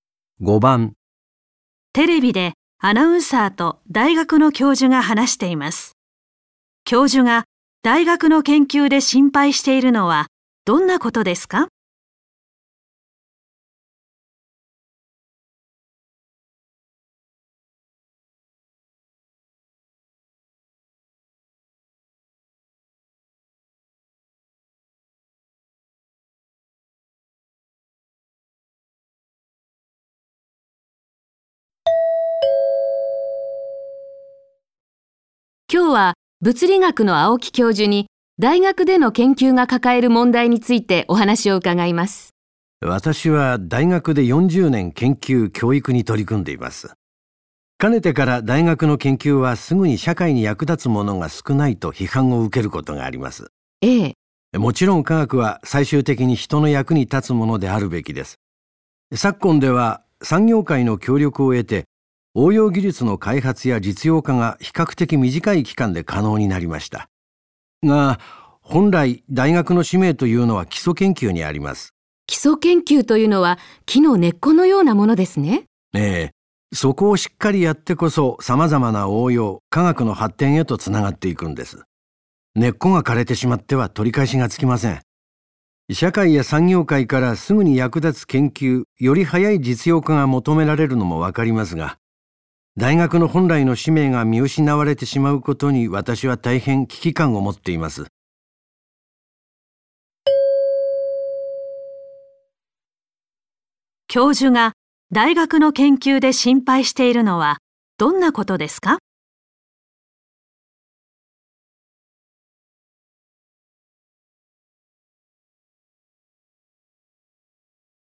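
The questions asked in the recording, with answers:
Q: 教授が大学の研究で心配しているのはどんなことですか?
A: 大学本来の使命である基礎研究が見失われること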